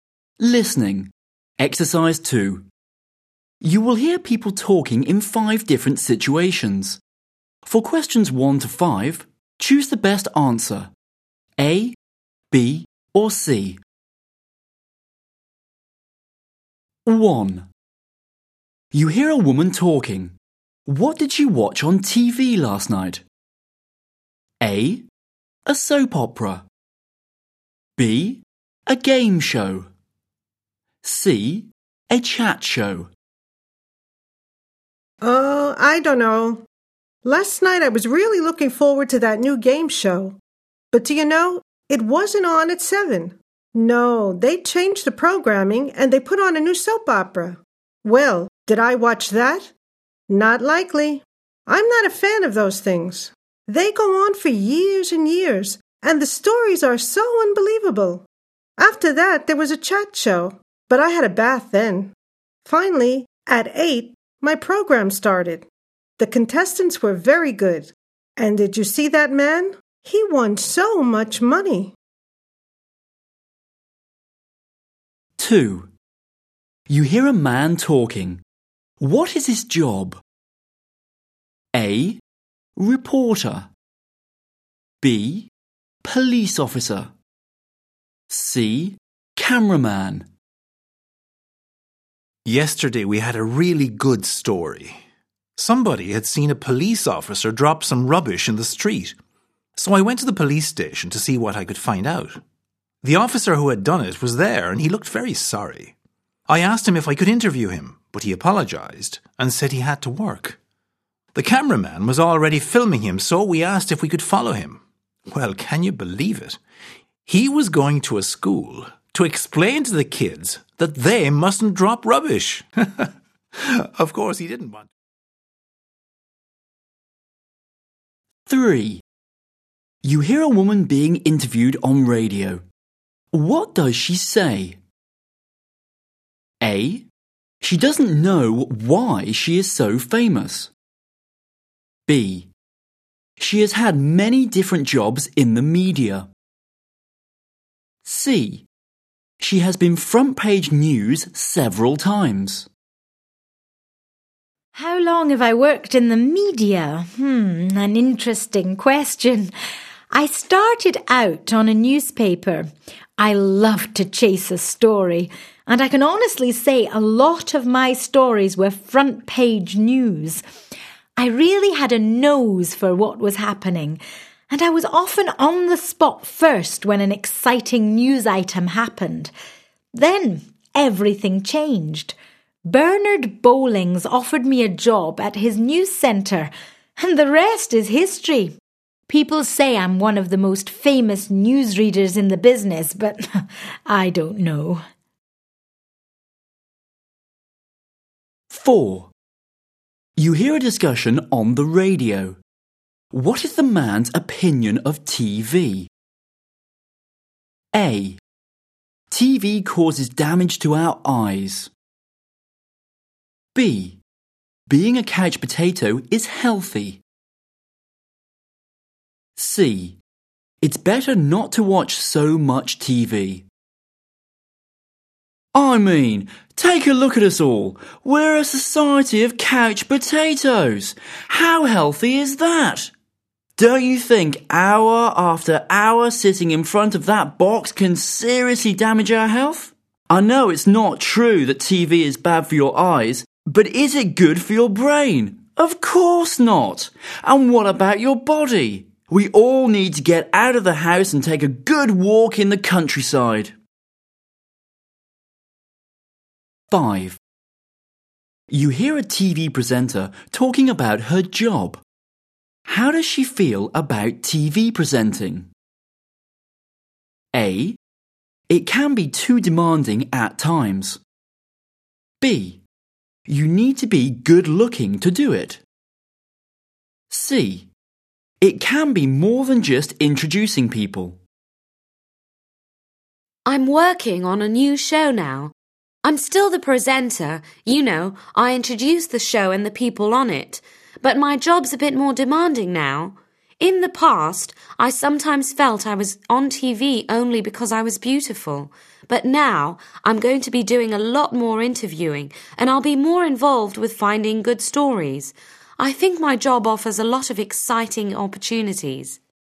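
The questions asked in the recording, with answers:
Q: What did she watch on TV last night?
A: B: a game show

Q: What is his job?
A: A: Reporter

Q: What does she say?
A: B: She has had many different jobs in the media.

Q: What is the man's opinion of TV?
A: C: It's better not to watch so much TV.

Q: How does she feel about TV presenting?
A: C: It can be more than just introducing people.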